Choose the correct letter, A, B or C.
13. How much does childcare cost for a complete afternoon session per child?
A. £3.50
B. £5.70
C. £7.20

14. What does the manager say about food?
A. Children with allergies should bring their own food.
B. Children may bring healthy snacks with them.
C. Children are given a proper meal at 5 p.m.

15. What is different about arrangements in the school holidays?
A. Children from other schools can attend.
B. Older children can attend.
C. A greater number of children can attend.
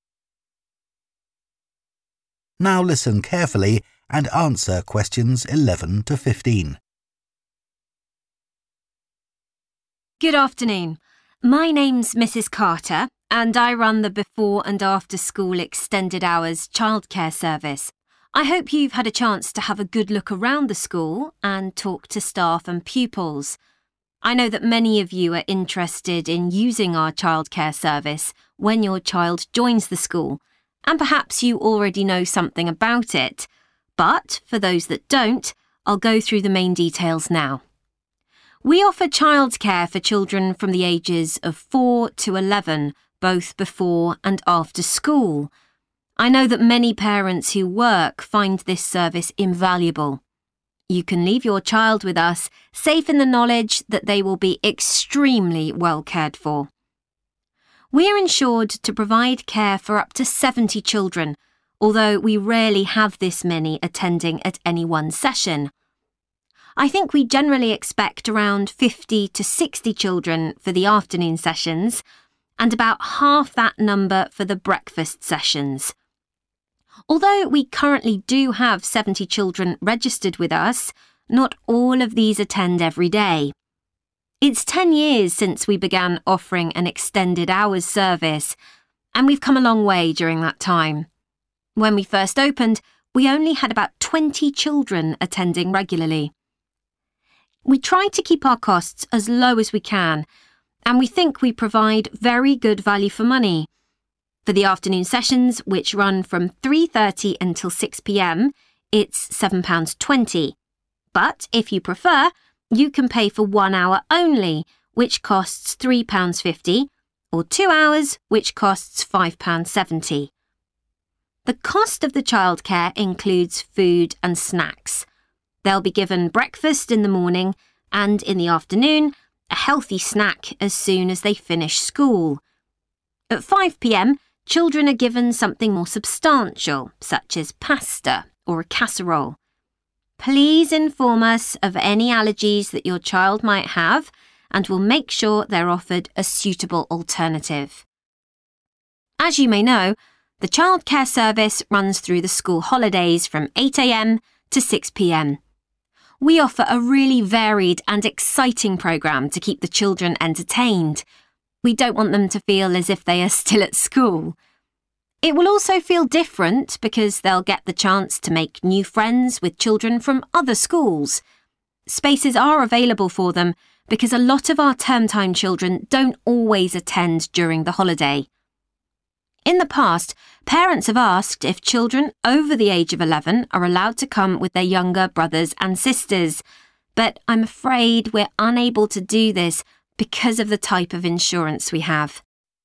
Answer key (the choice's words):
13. £7.20
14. Children are given a proper meal at 5 p.m.
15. Children from other schools can attend.

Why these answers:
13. For the afternoon sessions, which run from 3.30 until 6 p.m., it's £7.20 [Đối với các phiên buổi chiều, kéo dài từ 3h30 đến 6 giờ chiều, mức phí là 7.20 bảng → Chọn đáp án C] (Question 13). But if you prefer, you can pay for one hour only, which costs £3.50, or two hours which costs £5.70 [Nhưng nếu thích, bạn có thể chỉ trả trong một giờ với giá 3.50 bảng Anh hoặc hai giờ có giá 5.70 bảng → Loại đáp án A & B].
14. They'll be given breakfast in the morning and in the afternoon, a healthy snack as soon as they finish school [Các em sẽ được ăn sáng vào buổi sáng và buổi chiều, một bữa ăn nhẹ lành mạnh ngay sau khi học xong → Loại đáp án B]. At 5 p.m. children are given something more substantial [=proper] [Lúc 5 giờ chiều trẻ em được cho một món gì đó lớn hơn → Chọn đáp án C] (Question 14), such as pasta or a casserole. Please inform us of any allergies that your child might have and we'll make sure they're offered a suitable alternative [Vui lòng thông báo cho chúng tôi về bất kỳ trường hợp dị ứng nào mà con bạn có thể mắc phải và chúng tôi sẽ đảm bảo em ấy được cung cấp một món khác phù hợp → Loại đáp án A].
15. It will also feel different because they'll get the chance to make new friends with children from other schools [các em sẽ có cơ hội kết bạn mới với các bạn trẻ từ các trường khác → Chọn đáp án A] (Question 15) – spaces are available for them because a lot of our term-time children don't always attend during the holiday. In the past, parents have asked if children over the age of 11 are allowed to come with their younger brothers and sisters – but I'm afraid we're unable to do this [liệu trẻ em trên 11 tuổi được phép đi cùng với em trai và em gái của mình – nhưng tôi e rằng chúng tôi không thể làm điều này → Loại đáp án B] because of the type of insurance we have.